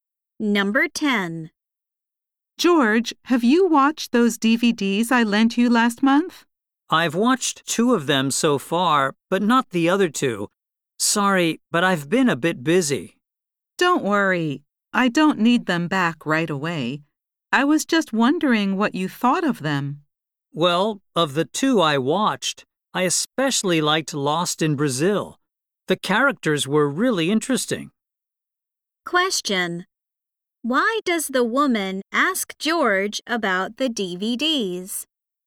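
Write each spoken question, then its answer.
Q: Why does the woman ask George about the DVDs?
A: She wants to know what he thought of them.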